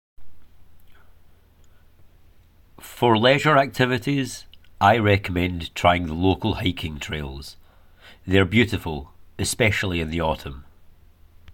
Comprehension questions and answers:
Answer the following questions. Write NO MORE THAN TWO WORDS AND/OR A NUMBER for each answer.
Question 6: What does the speaker recommend for leisure?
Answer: hiking trails

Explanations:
For leisure activities, I recommend trying the local hiking trails.